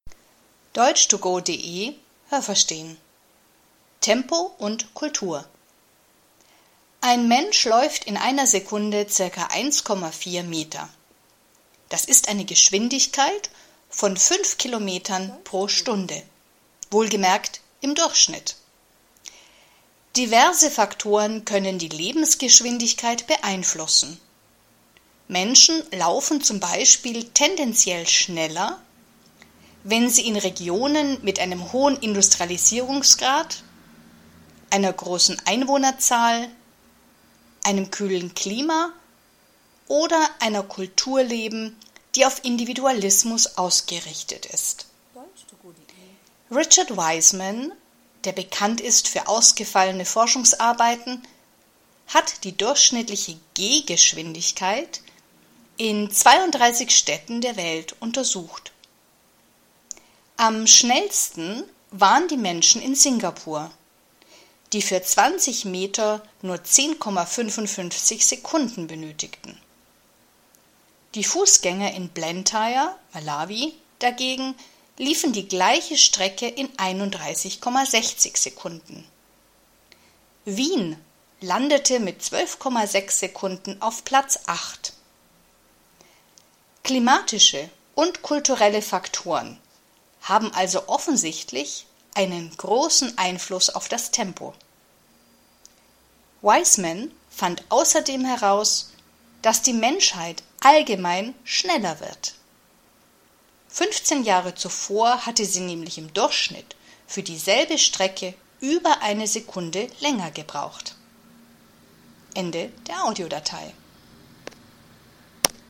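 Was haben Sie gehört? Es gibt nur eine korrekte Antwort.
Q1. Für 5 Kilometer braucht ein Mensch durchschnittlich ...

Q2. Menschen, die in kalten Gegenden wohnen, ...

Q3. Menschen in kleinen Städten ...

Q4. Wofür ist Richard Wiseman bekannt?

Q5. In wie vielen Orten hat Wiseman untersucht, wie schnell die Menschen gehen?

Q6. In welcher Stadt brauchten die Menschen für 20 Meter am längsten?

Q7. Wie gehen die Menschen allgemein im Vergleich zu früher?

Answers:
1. eine Stunde
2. laufen tendenziell schneller
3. laufen tendenziell langsamer
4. für ausgefallene Forschungsarbeiten
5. in 32 Städten
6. Blantyre (Malawi)
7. schneller

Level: B (mittel)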